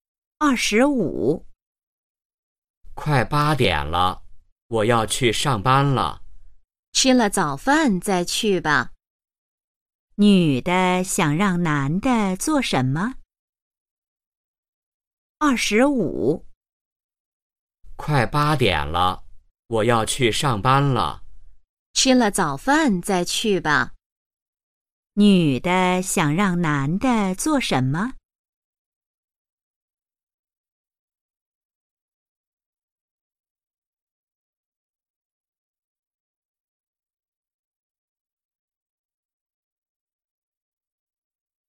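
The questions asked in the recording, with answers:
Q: 女的想让男的做什么?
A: 吃早饭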